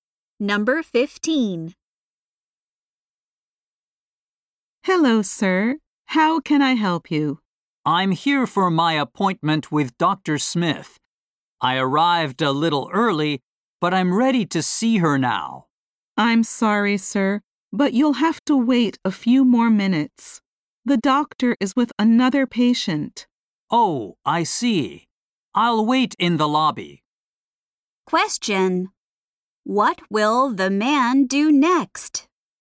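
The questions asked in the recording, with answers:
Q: What will the man do next?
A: Wait in the lobby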